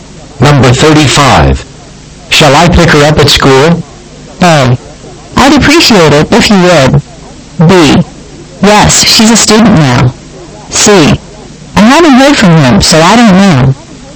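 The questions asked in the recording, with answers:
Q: Shall I pick her up at school?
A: A: I'd appreciate it if you would.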